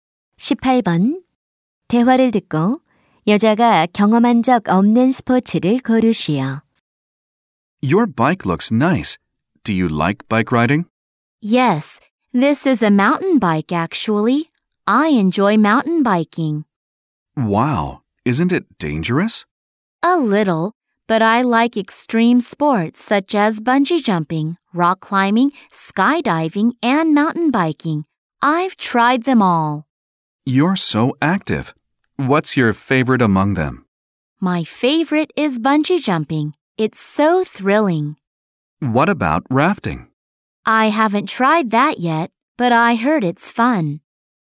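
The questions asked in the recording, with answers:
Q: 대화를 듣고 여자가 경험한 적 없는 스포츠를 고르시오.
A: 래프팅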